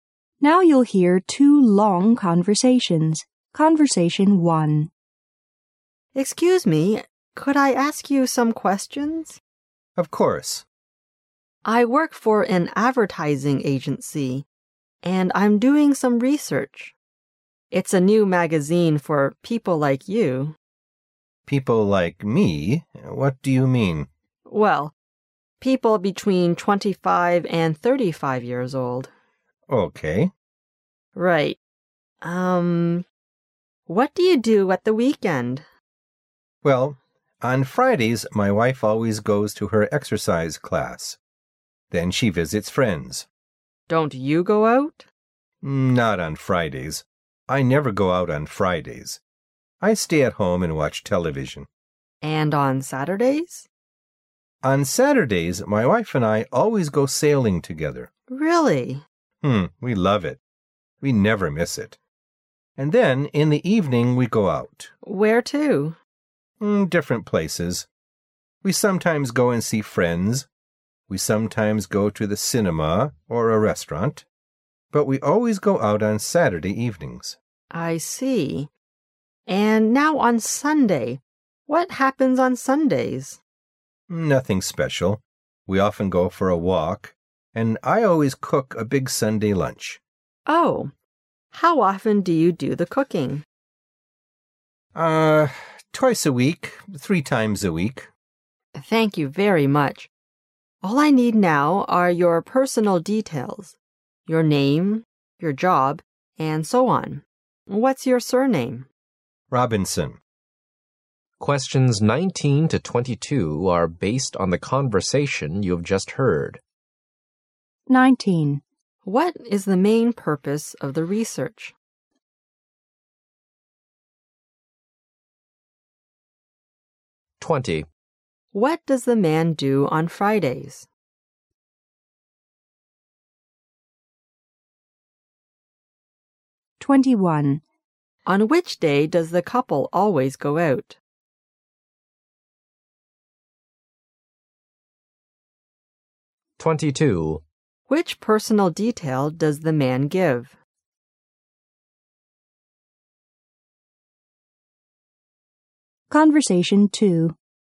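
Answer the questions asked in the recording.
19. Research for a new magazine for people aged 25 to 35
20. He stays at home and watches TV.
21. Saturday
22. His surname, Robinson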